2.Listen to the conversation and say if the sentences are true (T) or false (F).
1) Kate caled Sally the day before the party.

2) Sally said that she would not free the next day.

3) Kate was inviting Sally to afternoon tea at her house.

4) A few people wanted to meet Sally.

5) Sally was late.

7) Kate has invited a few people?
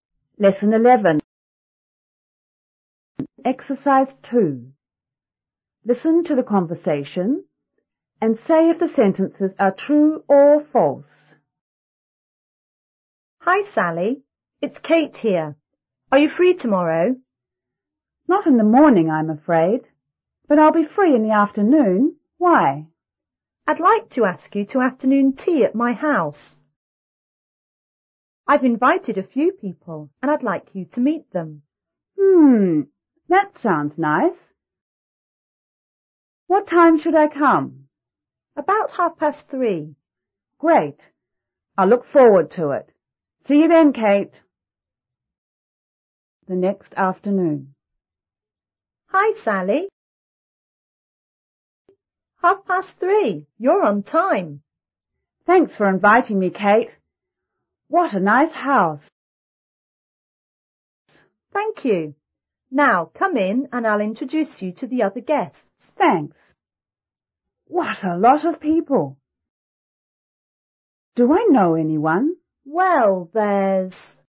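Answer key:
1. T
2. F
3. T
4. F
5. F
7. T

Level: 初中英语广州版5B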